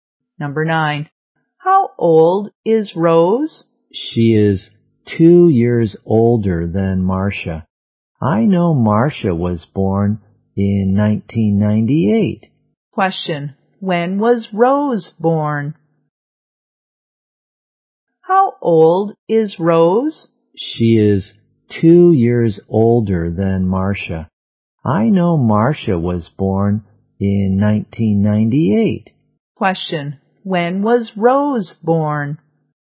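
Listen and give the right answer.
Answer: In 1996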